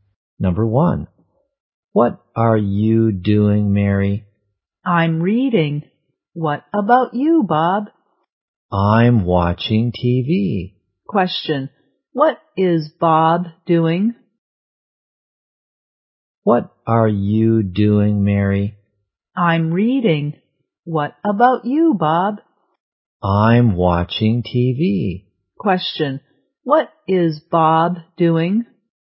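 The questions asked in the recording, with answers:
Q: what is Bob doing?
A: He is watching TV.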